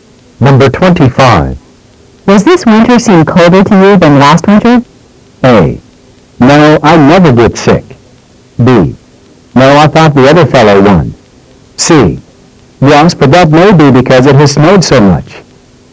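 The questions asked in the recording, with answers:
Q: Does this winter seem colder to you than last winter?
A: C: Yes, but that may be because it has snowed so much.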